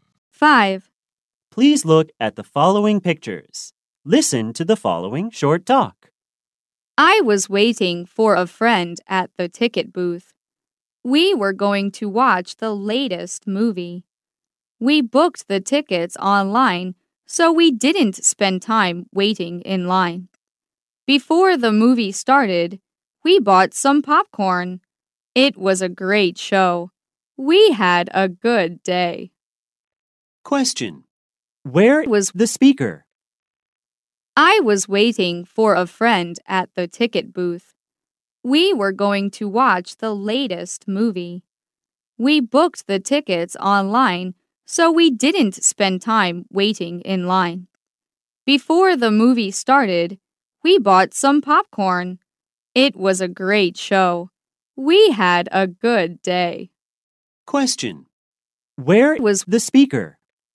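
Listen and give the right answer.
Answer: At a movie theater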